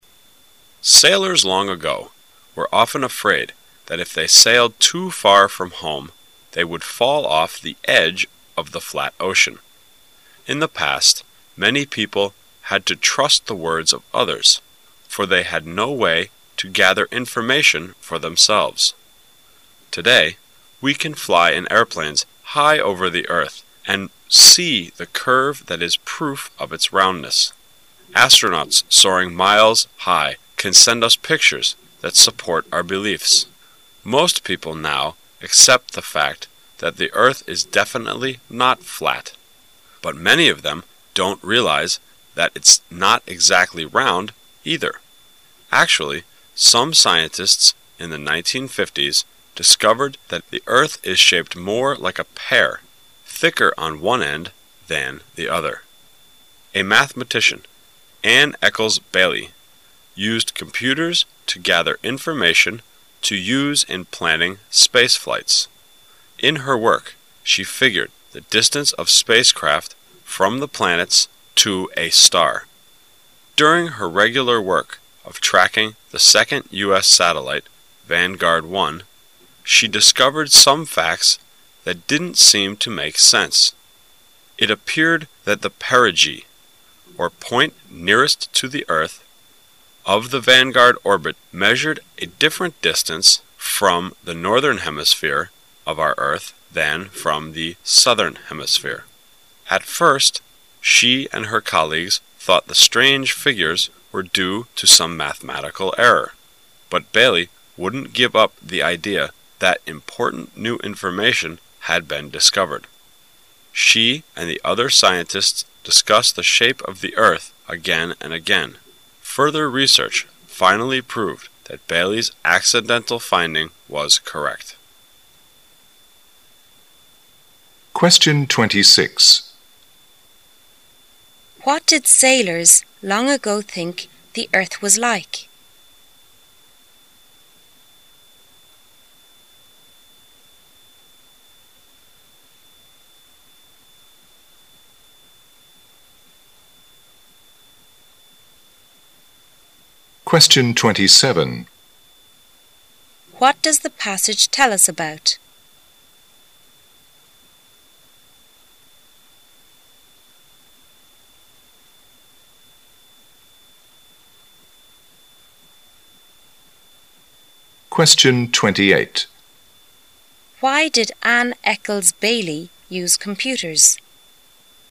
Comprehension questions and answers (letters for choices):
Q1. What does the passage tell us about?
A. How most mathematicians work.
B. Accidental discovery about the earth's shape.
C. How to track an orbit.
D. How astronauts use computers to measure the size of satellite.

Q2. Why did Ann Eckels Baillie use computers?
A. To prove the earth was round.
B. To gather information for planning space flights.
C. Because all spacecraft had to carry computers.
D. Because it can measure the size of the satellite.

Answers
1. B
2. B

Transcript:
[解析] 26-28 Sailors long ago were often afraid that if they sailed too far from home they would fall off the edge of the flat ocean. In the past, many people had to trust the words of others, for they had no way to gather information for themselves. Today, we can fly in airplanes high over the earth and see the curve that is proof of its roundness. Astronauts soaring miles high can send us pictures that support our beliefs. Most people now accept the fact that the earth is definitely not flat. But many of them don't realize that it's not exactly round, either. Actually, some scientists in the 1950's discovered that the earth is shaped more like a pear, thicker on one end than the other. A mathematician, Ann Eckels Baillie, used computers to gather information to use in planning space flights. In her work, she figured the distance of spacecraft from the planet to a star. During her regular work of tracking the second U. S. satellite, Vanguard I, she discovered some facts that didn't seem to make sense. It appeared that the perigee (or point nearest to the earth) of the Vanguard orbit measured a different distance from the northern hemisphere of our earth than from the southern hemisphere. At first, she and her colleagues thought the strange figures were due to some mathematical error. But Baillie wouldn't give up the idea that important new information had been discovered. She and the other scientists discussed the shape of the earth again and again. Further research finally proved that Baillie's accidental finding was correct. What did sailors long ago think the earth was like?